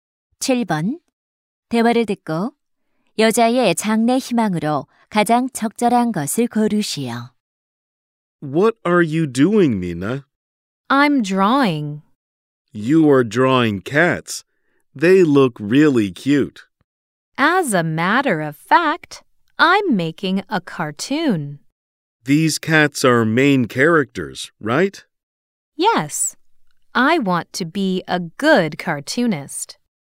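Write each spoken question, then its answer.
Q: 대화를 듣고 여자의 장래 희망으로 가장 적절한 것을 고르시오.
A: 만화가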